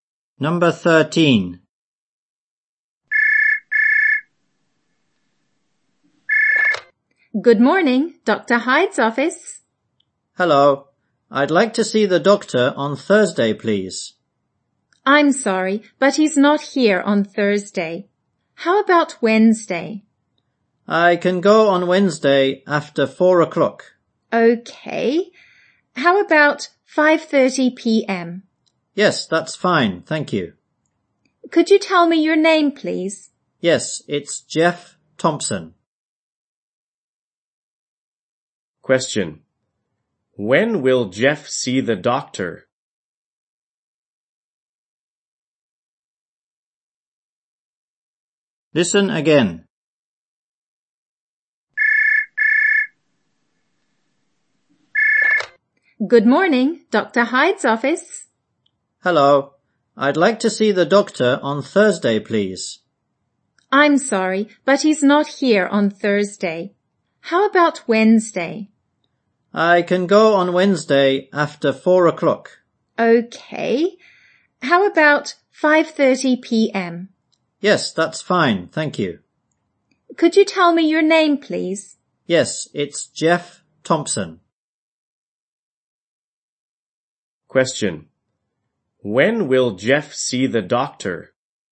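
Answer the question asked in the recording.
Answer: On Wednesday at 5:30 p.m.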